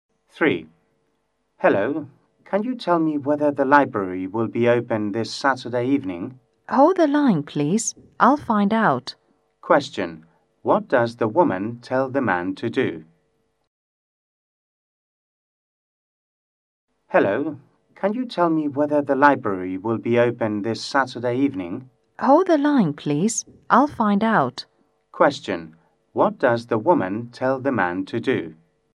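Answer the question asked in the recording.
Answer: Hold the line (wait on the phone)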